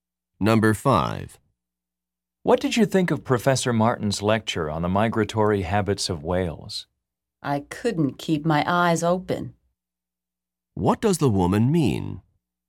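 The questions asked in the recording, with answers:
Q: What does the woman mean?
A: The lecture was boring.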